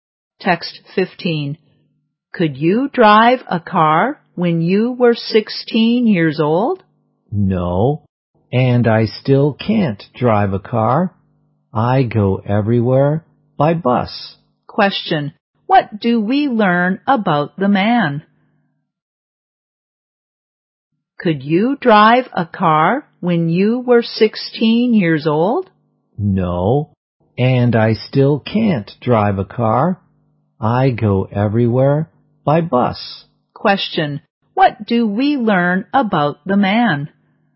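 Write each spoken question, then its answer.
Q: Question. What do we learn about the man?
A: He can't drive a car; he goes everywhere by bus.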